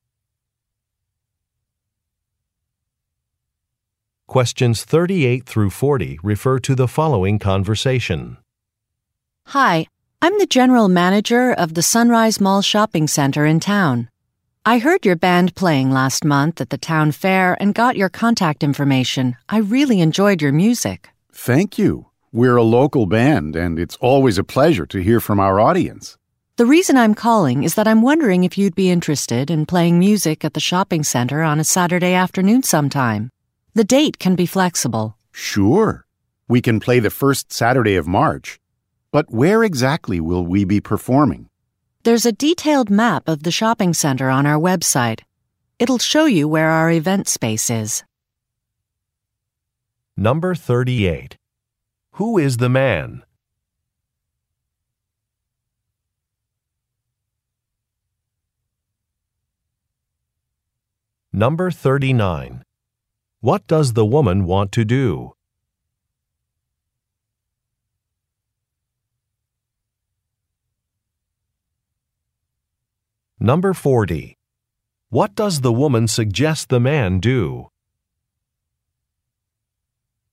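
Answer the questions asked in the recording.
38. A musician in a local band
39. Hire the band to play at the shopping center
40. Look at the map on the website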